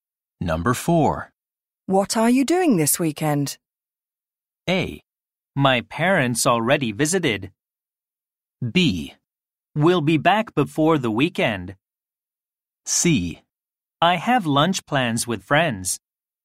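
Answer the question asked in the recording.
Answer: C: I have lunch plans with friends.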